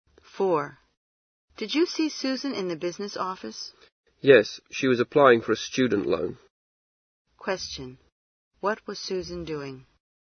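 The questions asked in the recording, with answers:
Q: What was Susan doing?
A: Applying for a student loan.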